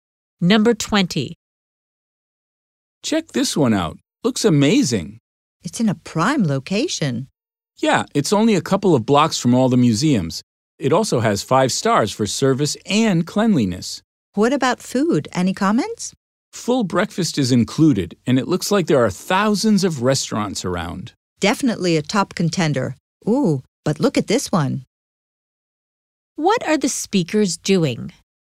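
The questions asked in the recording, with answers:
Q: What are the speakers doing?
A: Choosing a hotel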